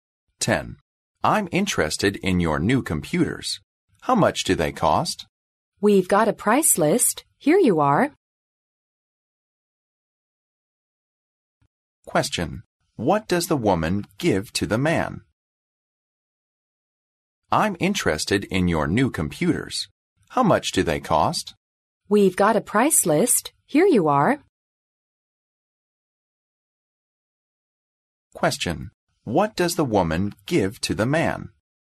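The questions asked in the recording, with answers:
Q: What does the woman give to the man?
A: A price list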